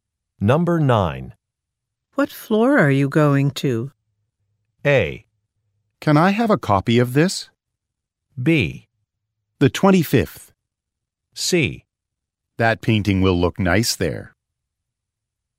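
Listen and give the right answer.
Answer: B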